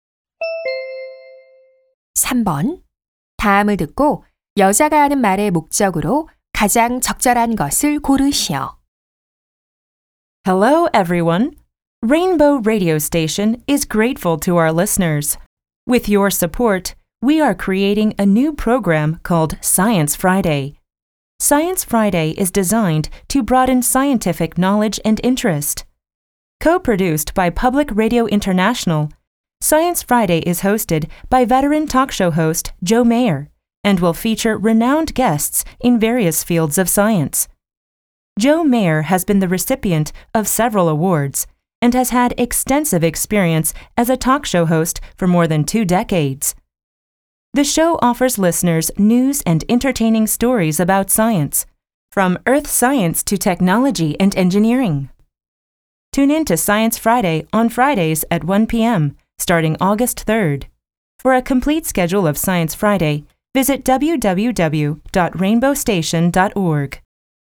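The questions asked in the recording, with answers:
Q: 다음을 듣고 여자가 하는 말의 목적으로 가장 적절한 것을 고르시오.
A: 새 과학 라디오 프로그램(Science Friday)을 홍보하려고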